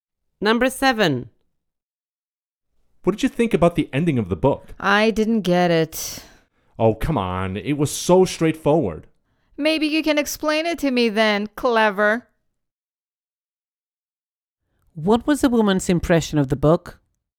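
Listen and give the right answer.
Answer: She didn't understand the ending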